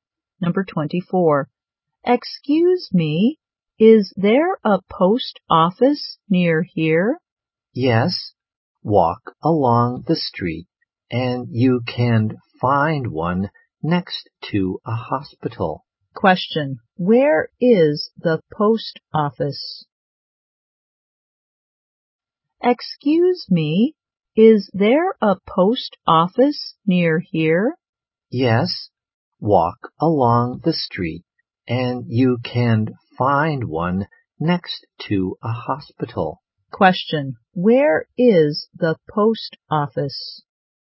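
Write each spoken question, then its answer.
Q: Where is the post office?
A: Next to a hospital.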